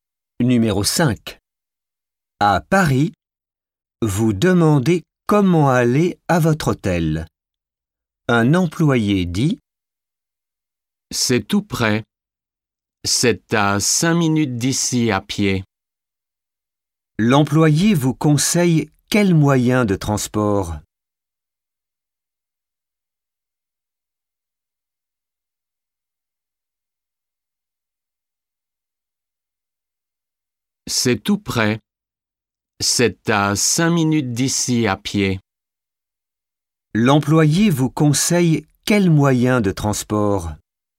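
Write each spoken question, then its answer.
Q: L'employé vous conseille quel moyen de transport?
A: À pied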